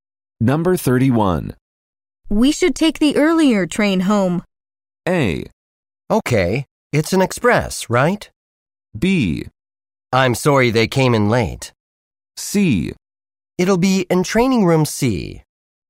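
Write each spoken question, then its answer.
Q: We should take the earlier train home.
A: A: Okay, it's an express, right?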